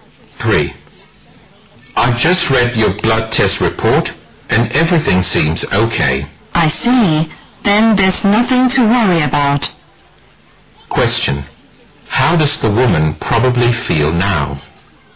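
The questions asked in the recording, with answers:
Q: How does the woman probably feel now?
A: Relieved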